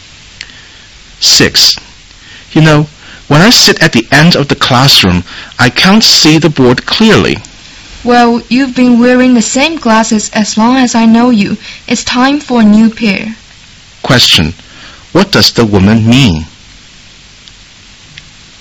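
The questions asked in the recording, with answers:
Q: What does the woman mean?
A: The man needs a new pair of glasses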